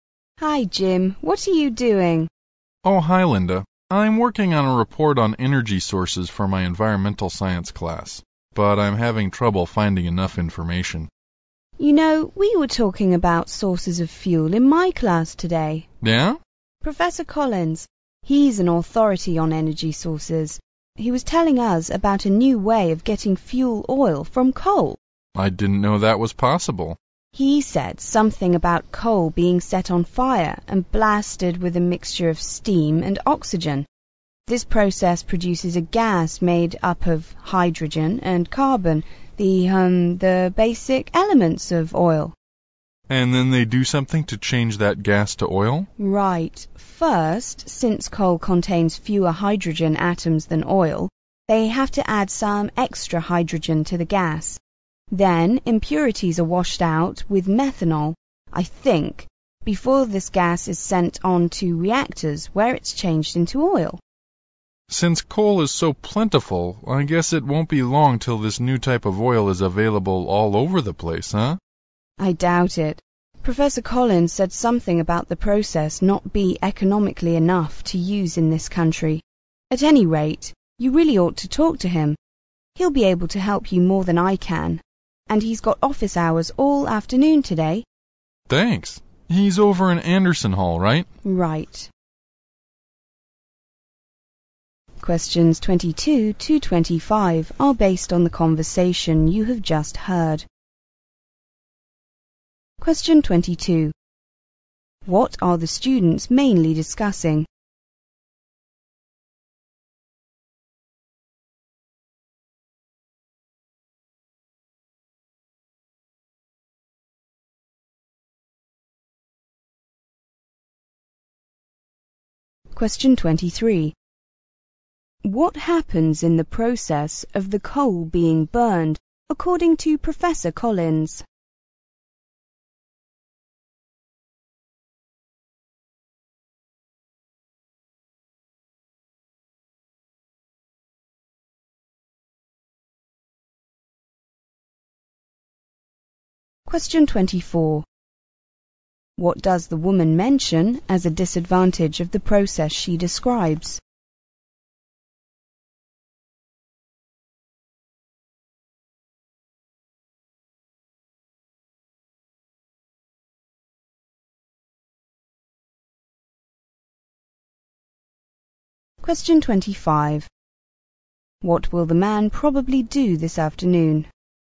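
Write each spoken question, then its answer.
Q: What are the students mainly discussing?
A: A new way of getting fuel oil from coal

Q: What happens in the process of the coal being burned, according to Professor Collins?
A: It produces a gas of hydrogen and carbon

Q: What does the woman mention as a disadvantage of the process she describes?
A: It is not economical enough to use in this country

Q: What will the man probably do this afternoon?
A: Go to talk to Professor Collins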